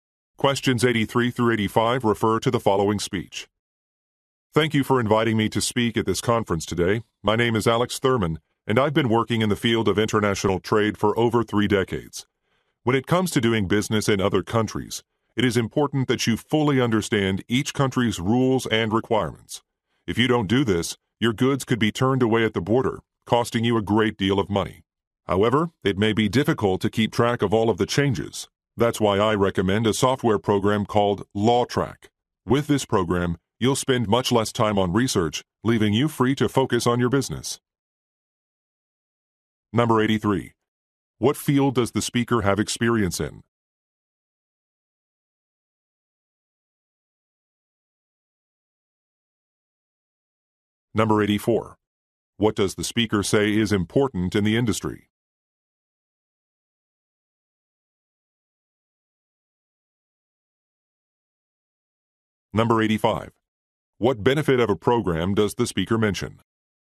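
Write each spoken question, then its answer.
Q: What field does the speaker have experience in?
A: International trade

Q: What does the speaker say is important in the industry?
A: Understanding each country's rules and requirements

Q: What benefit of a program does the speaker mention?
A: It saves time on research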